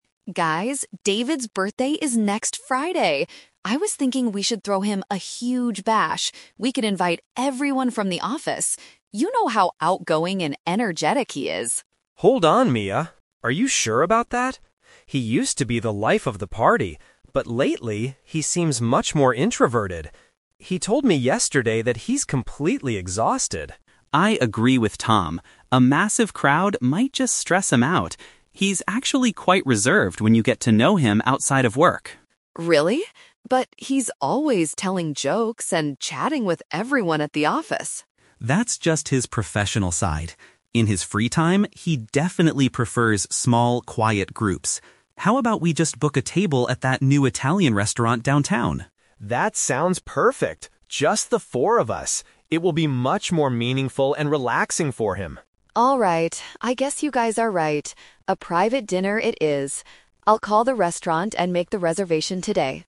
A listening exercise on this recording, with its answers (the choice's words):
Listen to a conversation between three friends planning a birthday. For each question, choose the correct answer A, B, or (C).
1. What does Mia initially want to do for David's birthday?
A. Buy him a very expensive gift from the team.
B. Organize a large celebration with a lot of people.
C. Take him out to a new Italian restaurant.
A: Organize a large celebration with a lot of people.

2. Why do Tom and Sam disagree with Mia's idea?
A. They believe David prefers peaceful settings nowadays.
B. They think David actively dislikes his coworkers.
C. They do not have enough money to pay for a big event.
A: They believe David prefers peaceful settings nowadays.

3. What is their final decision for the birthday?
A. To host a large party at their office.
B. To cook a special dinner at David's house.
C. To have a meal with a few close friends.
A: To have a meal with a few close friends.

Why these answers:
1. Mia says, "we should throw him a huge bash. We could invite everyone..." The phrase "huge bash" and "invite everyone" means organizing a large celebration.
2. Tom mentions David is "introverted" and "exhausted," and Sam says he "prefers small, quiet groups." Option A is a good summary of these points.
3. They agree to "book a table at that new Italian restaurant" for "just the four of us." This matches having a meal with a few close friends.

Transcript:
Mia: Guys, David's birthday is next Friday! I was thinking we should throw him a huge bash. We could invite everyone from the office. You know how outgoing and energetic he is!
Tom: Hold on, Mia. Are you sure about that? He used to be the life of the party, but lately, he seems much more introverted. He told me yesterday that he's completely exhausted.
Sam: I agree with Tom. A massive crowd might just stress him out. He's actually quite reserved when you get to know him outside of work.
Mia: Really? But he's always telling jokes and chatting with everyone at the office!
Sam: That's just his professional side. In his free time, he definitely prefers small, quiet groups. How about we just book a table at that new Italian restaurant downtown?
Tom: That sounds perfect. Just the four of us. It will be much more meaningful and relaxing for him.
Mia: Alright, I guess you guys are right. A private dinner it is. I'll call the restaurant and make the reservation today.